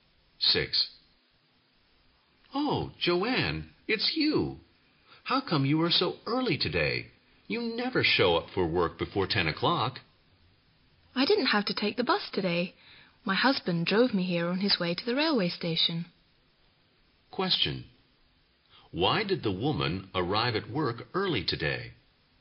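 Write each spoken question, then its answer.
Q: Why did the woman arrive at work early today?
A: Her husband drove her to work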